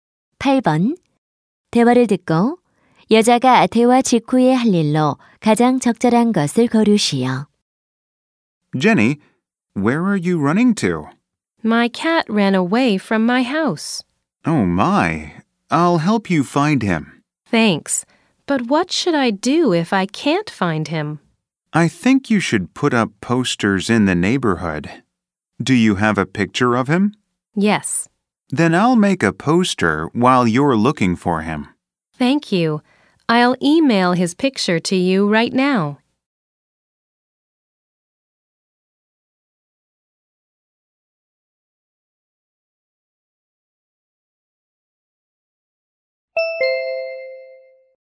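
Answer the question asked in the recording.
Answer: 고양이 사진을 이메일로 보내기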